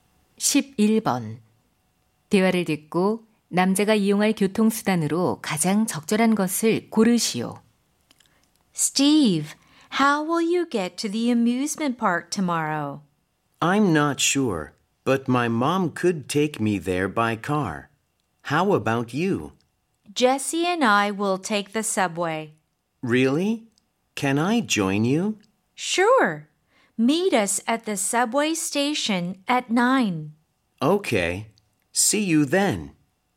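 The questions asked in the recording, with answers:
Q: 대화를 듣고 남자가 이용할 교통수단으로 가장 적절한 것을 고르시오.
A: 지하철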